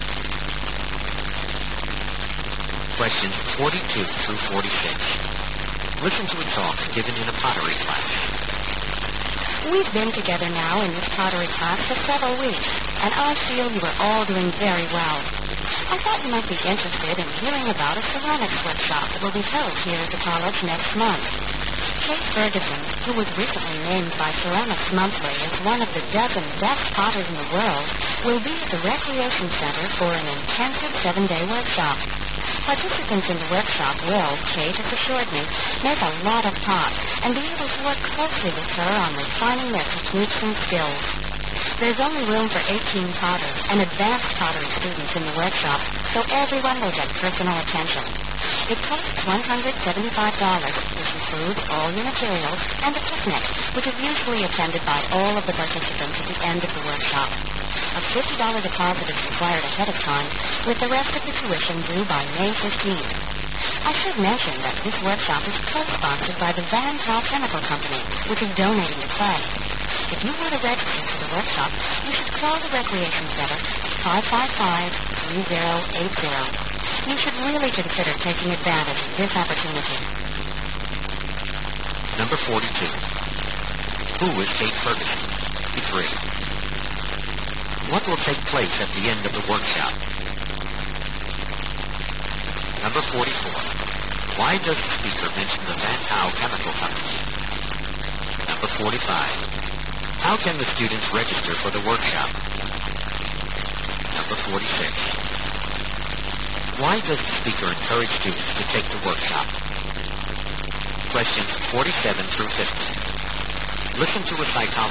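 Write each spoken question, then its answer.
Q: Who is Kate Ferguson?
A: A famous potter

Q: What will take place at the end of the workshop?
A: A picnic

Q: Why does the speaker mention the Van Tau Chemical Company?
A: It co-sponsors the workshop and donates the clay

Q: How can the students register for the workshop?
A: By calling the Recreation Center

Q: Why does the speaker encourage students to take the workshop?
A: It is a rare chance to work closely with a top potter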